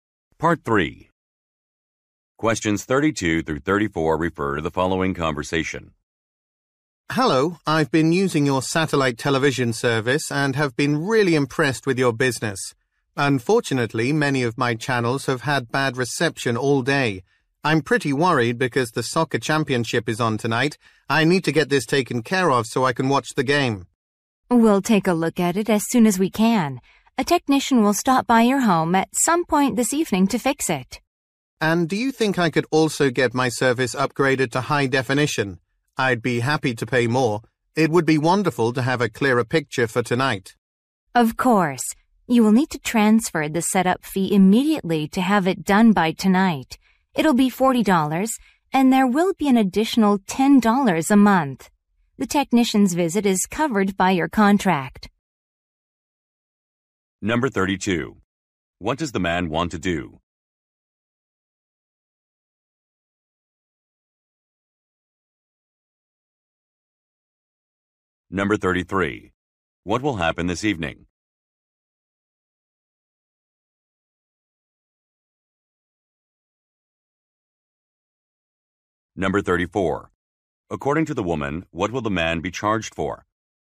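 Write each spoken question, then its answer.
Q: What will happen this evening?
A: A technician will visit his home to fix the reception

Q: According to the woman, what will the man be charged for?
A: Upgrading to high definition ($40 setup fee plus $10 a month)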